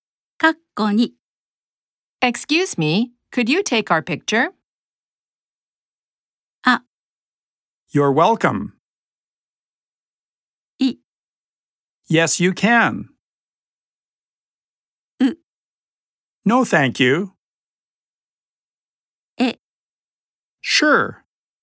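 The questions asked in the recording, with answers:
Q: Excuse me, could you take our picture?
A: E: Sure.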